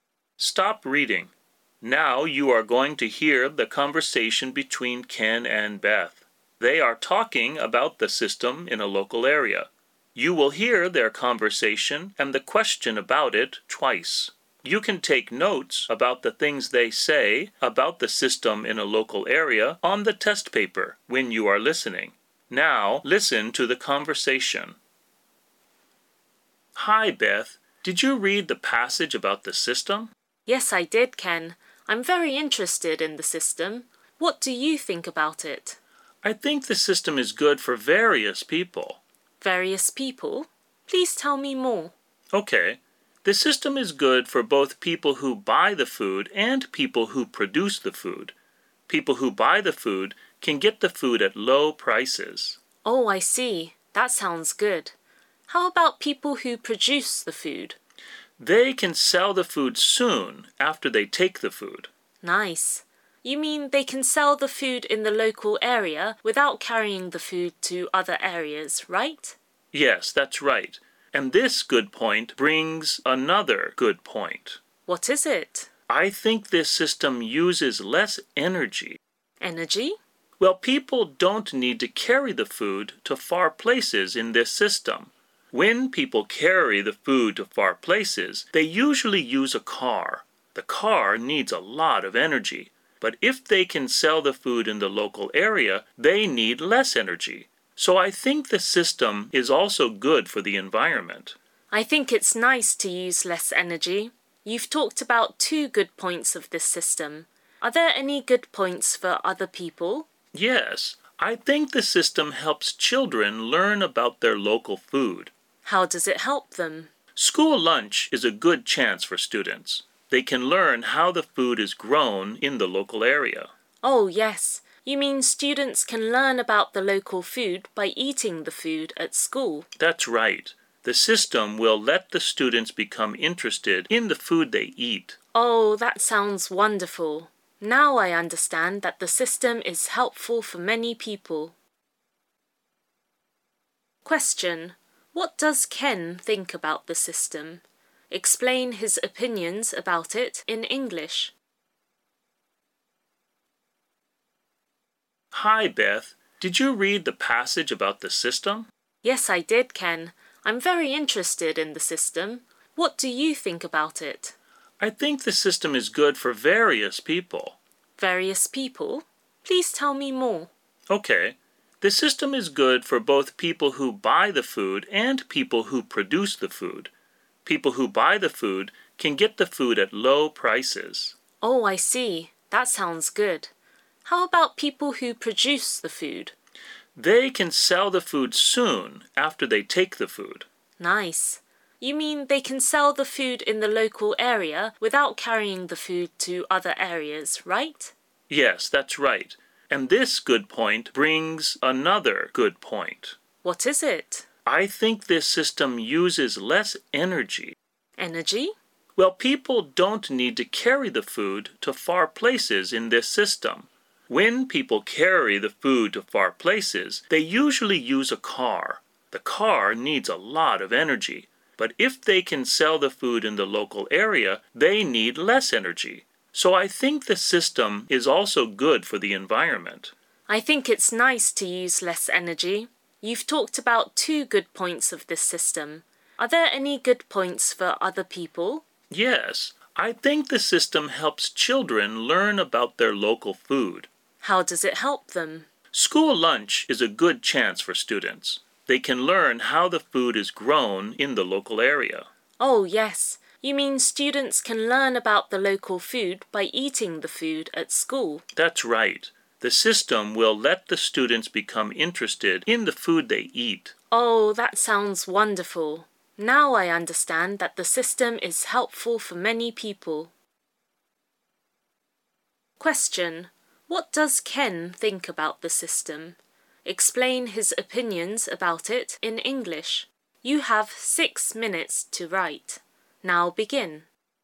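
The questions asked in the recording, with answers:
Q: What does Ken think about the system?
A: It is good for many people: buyers get food at low prices, producers can sell food soon in the local area, it uses less energy so it is good for the environment, and students can learn about local food through school lunch.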